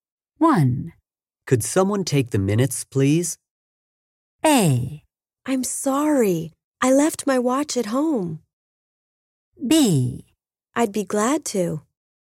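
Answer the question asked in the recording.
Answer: B: I'd be glad to.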